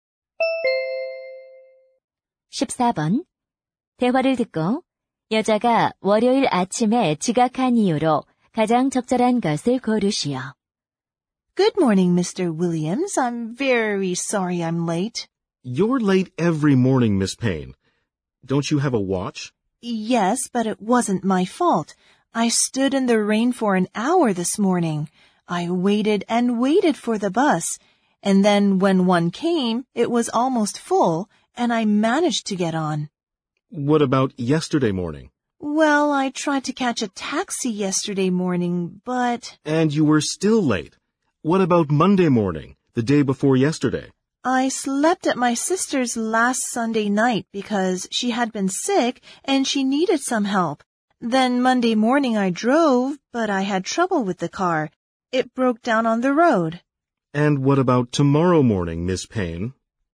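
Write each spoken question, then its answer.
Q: 대화를 듣고 여자가 월요일 아침에 지각한 이유로 가장 적절한 것을 고르시오.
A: 차가 도로에서 고장 나서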